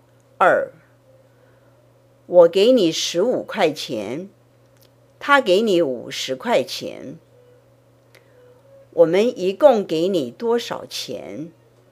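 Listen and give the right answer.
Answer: 65块钱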